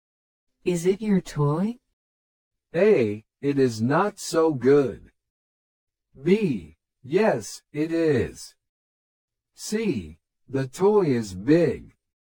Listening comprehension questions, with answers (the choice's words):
Select the best response to the question or statement and mark the letter (A), (B), or (C) on your answer sheet.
Is it your toy?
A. It is not so good.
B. Yes, it is.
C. The toy is big.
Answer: Yes, it is.

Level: 初級者用